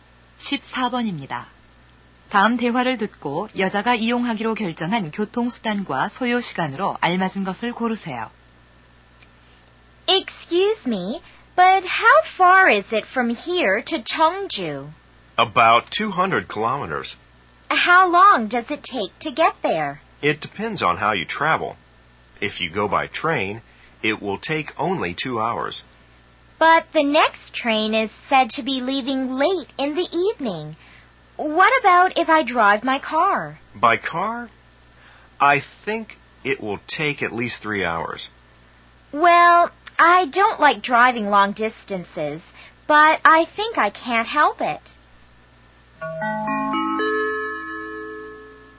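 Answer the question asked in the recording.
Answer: 자동차, 3시간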